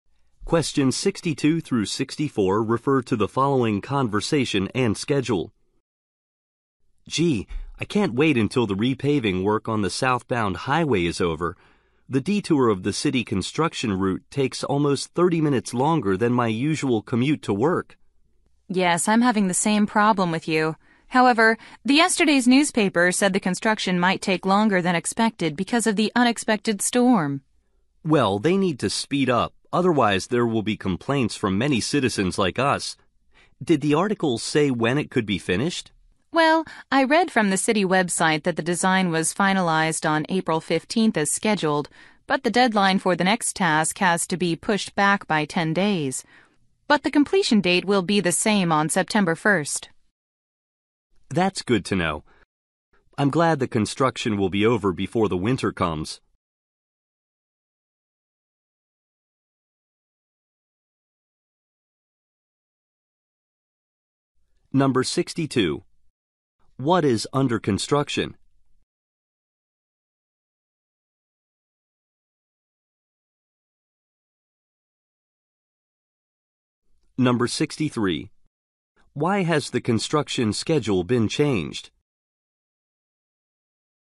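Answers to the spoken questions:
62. The southbound highway
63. An unexpected storm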